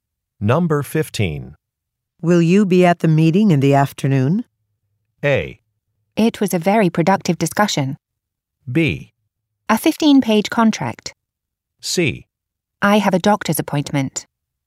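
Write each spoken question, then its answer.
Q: Will you be at the meeting in the afternoon?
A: C: I have a doctor's appointment.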